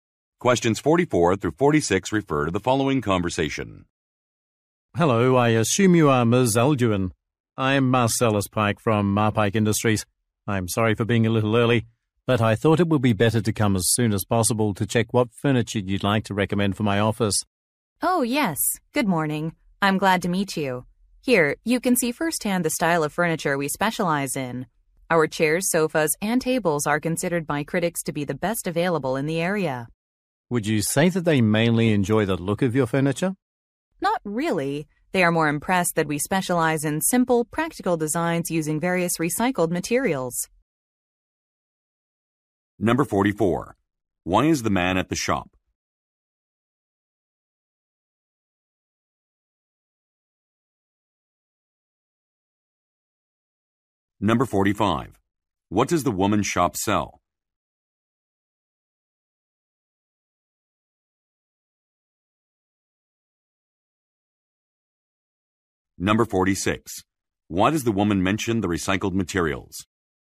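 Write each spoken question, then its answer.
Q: Why is the man at the shop?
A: To see what furniture she recommends for his office

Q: What does the woman's shop sell?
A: Furniture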